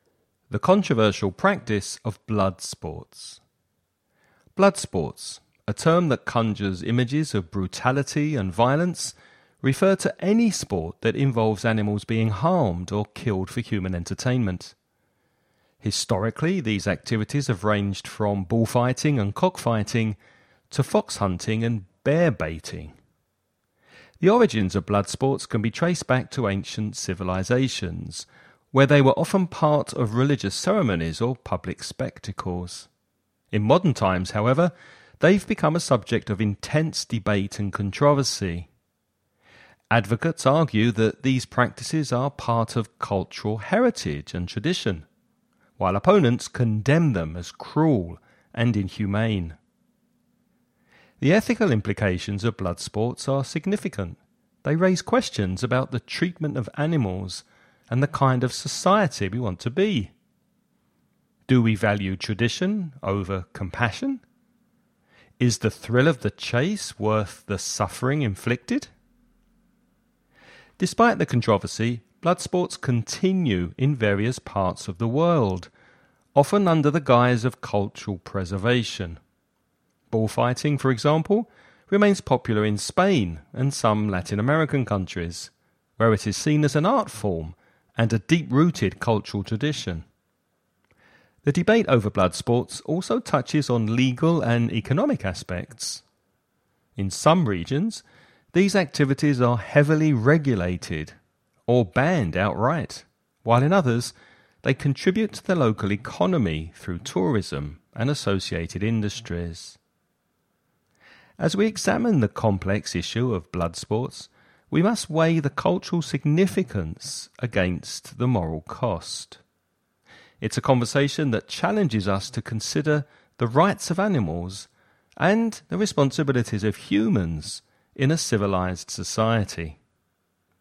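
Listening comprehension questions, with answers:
Now listen and answer the questions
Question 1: How far back can the origins of blood sports be traced?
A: To ancient civilizations.

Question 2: Why are blood sports controversial?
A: Because they involve animals being harmed or killed for human entertainment; opponents see them as cruel and inhumane.

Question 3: What do advocates of blood sports argue?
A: That they are part of cultural heritage and tradition.

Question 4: What ethical questions do blood sports raise?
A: How animals are treated and what kind of society we want to be: do we value tradition over compassion, and is the thrill of the chase worth the suffering?

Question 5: What legal and economic aspects are associated with blood sports?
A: Some regions heavily regulate or ban them, while in others they help the local economy through tourism and related industries.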